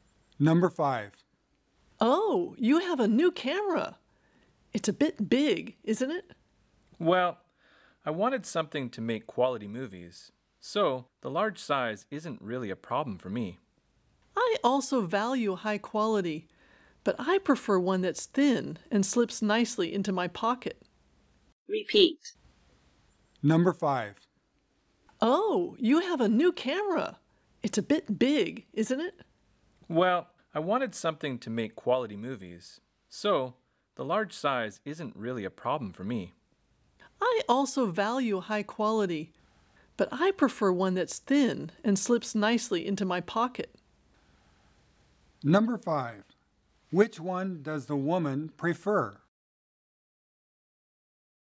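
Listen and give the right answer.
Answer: A thin, high-quality camera that fits in her pocket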